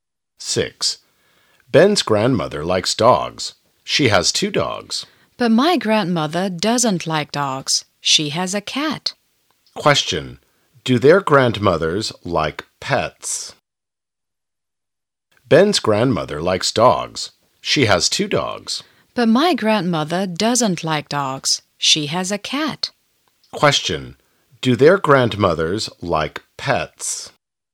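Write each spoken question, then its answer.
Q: Question. Do their grandmothers like pets?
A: Yes, both like pets (dogs and a cat)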